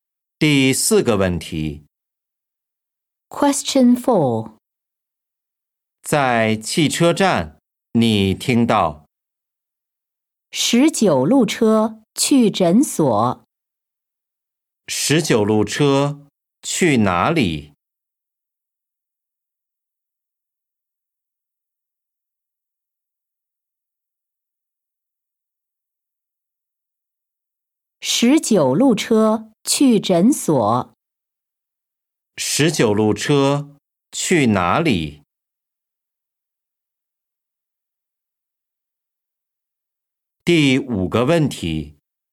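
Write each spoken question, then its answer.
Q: 十九路车去哪里?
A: 诊所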